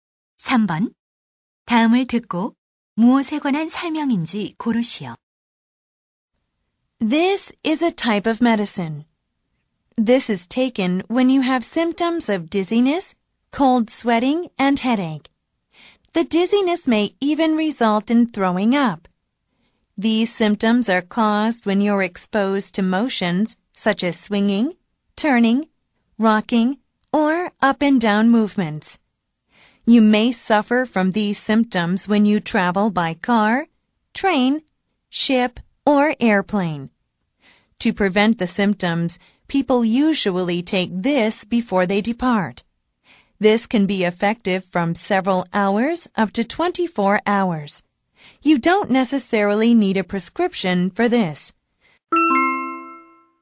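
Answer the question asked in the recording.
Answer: 멀미약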